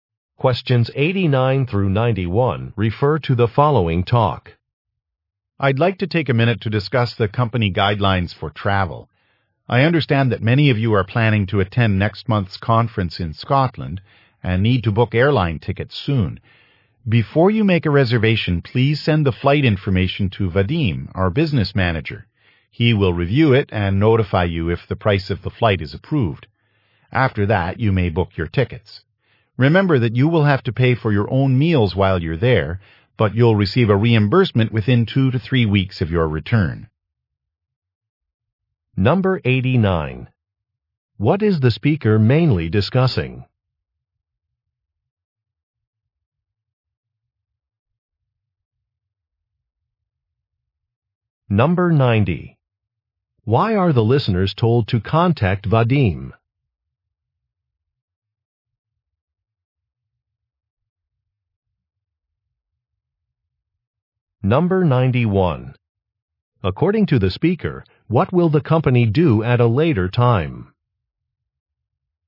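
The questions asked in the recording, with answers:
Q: What is the speaker mainly discussing?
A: Company travel guidelines

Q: Why are the listeners told to contact Vadim?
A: To get the flight price approved

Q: According to the speaker, what will the company do at a later time?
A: Reimburse meal expenses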